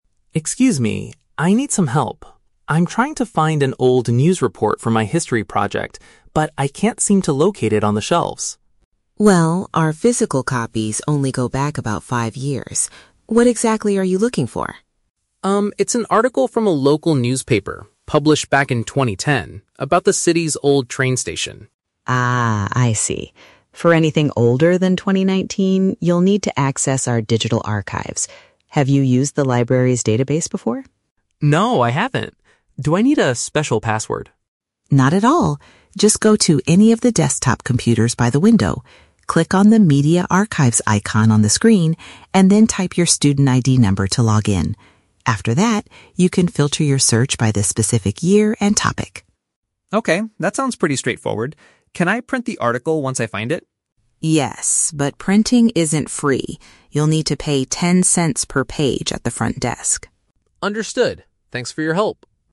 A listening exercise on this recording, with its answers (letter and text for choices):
Listen to a conversation between a student and a librarian. Choose the correct answer (A, B, or C) for each question.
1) Why is the student unable to find the newspaper on the shelves?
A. The library only keeps recent printed materials on display.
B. He does not know which section of the building he is in.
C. Another student has already borrowed the specific issue.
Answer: A. The library only keeps recent printed materials on display.

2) How should the student access the digital records?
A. By typing a secret password given by the librarian.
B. By using his personal laptop near the window.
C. By entering his university identification code on a computer.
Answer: C. By entering his university identification code on a computer.

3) What is the rule regarding making physical copies of the article?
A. Students are completely forbidden from printing archive materials.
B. It is permitted, provided that the user pays a small fee.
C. The printing service is provided to all students free of charge.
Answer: B. It is permitted, provided that the user pays a small fee.

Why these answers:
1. The librarian says that their "physical copies only go back about five years". Option A paraphrases this perfectly (physical copies = printed materials; go back about five years = recent). Option B is a plausible guess if someone is lost, but it is not mentioned. Option C is the Trap: It is a common reason for not finding a book, but the real reason here is the publication date.
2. The librarian tells Leo to "type your student ID number to log in". Option C uses synonyms to express this (type = enter; student ID number = university identification code). Option A is the Trap: Leo asks if he needs a "special password", but the librarian says "Not at all". Option B is also a Trap: The librarian mentions "computers by the window", meaning the library's desktop computers, not Leo's personal laptop.
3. The librarian says "Yes, but printing isn't free" and mentions a cost of "ten cents per page". Option B paraphrases this (Yes = permitted; pay ten cents = pay a small fee). Option A is the exact opposite of what the librarian says. Option C is the Trap: The word "free" is used in the audio, but the librarian says it isn't free.

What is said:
Leo: Excuse me, I need some help. I'm trying to find an old news report for my history project, but I can't seem to locate it on the shelves.
Librarian: Well, our physical copies only go back about five years. What exactly are you looking for?
Leo: Um, it's an article from a local newspaper published back in 2010 about the city's old train station.
Librarian: Ah, I see. For anything older than 2019, you'll need to access our digital archives. Have you used the library's database before?
Leo: No, I haven't. Do I need a special password?
Librarian: Not at all. Just go to any of the desktop computers by the window. Click on the "Media Archives" icon on the screen, and then type your student ID number to log in. After that, you can filter your search by the specific year and topic.
Leo: Okay, that sounds pretty straightforward. Can I print the article once I find it?
Librarian: Yes, but printing isn't free. You'll need to pay ten cents per page at the front desk.